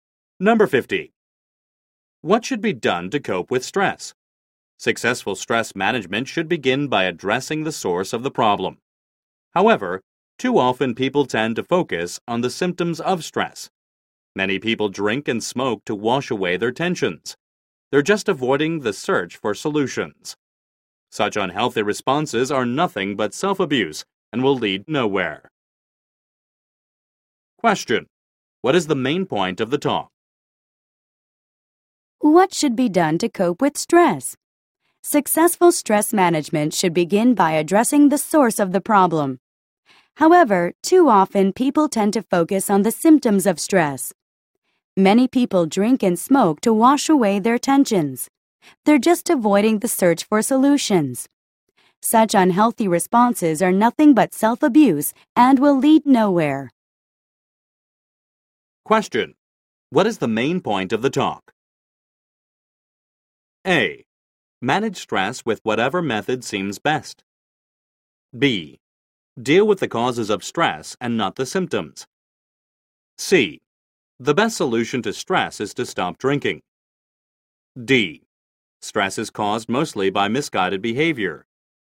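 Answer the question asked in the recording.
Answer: B: Deal with the causes of stress and not the symptoms.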